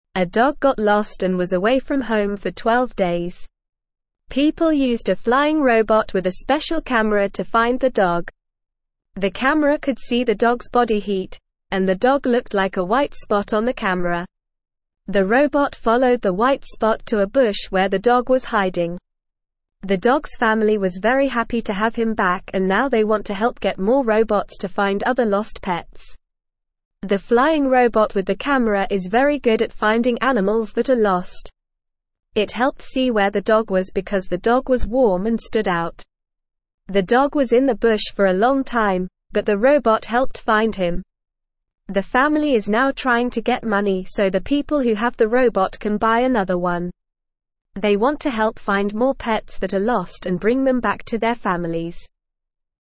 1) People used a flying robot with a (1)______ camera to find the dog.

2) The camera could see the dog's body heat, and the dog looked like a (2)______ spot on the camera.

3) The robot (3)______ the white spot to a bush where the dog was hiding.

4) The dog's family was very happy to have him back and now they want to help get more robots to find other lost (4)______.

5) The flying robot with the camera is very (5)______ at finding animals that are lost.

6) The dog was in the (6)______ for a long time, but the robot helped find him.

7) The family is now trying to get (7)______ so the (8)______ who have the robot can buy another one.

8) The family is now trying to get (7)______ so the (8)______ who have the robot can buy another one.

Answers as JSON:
{"1": "special", "2": "white", "3": "followed", "4": "pets", "5": "good", "6": "bush", "7": "money", "8": "people"}

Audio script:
A dog got lost and was away from home for 12 days. People used a flying robot with a special camera to find the dog. The camera could see the dog's body heat, and the dog looked like a white spot on the camera. The robot followed the white spot to a bush where the dog was hiding. The dog's family was very happy to have him back and now they want to help get more robots to find other lost pets.
The flying robot with the camera is very good at finding animals that are lost. It helped see where the dog was because the dog was warm and stood out. The dog was in the bush for a long time, but the robot helped find him. The family is now trying to get money so the people who have the robot can buy another one. They want to help find more pets that are lost and bring them back to their families.

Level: Level 1